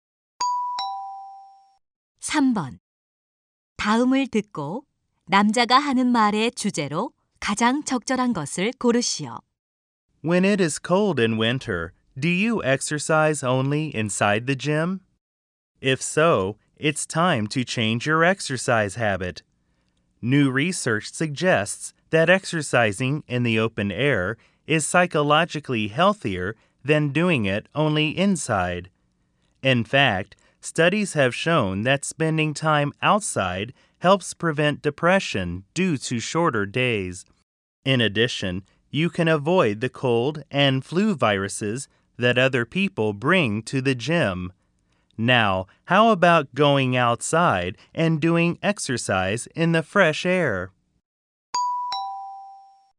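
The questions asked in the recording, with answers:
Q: 다음을 듣고 남자가 하는 말의 주제로 가장 적절한 것을 고르시오.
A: 겨울철 야외 운동의 이점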